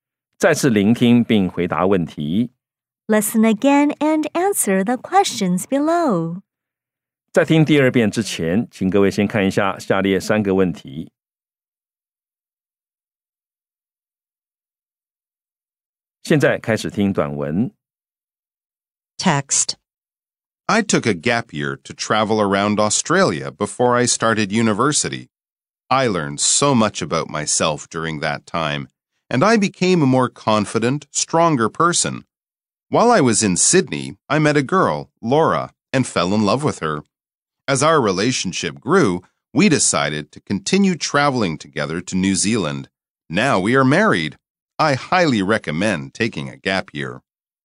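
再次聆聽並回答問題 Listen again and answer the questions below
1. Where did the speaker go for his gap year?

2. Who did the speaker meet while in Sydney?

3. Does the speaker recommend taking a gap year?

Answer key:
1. Australia
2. Laura
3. Yes

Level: 中階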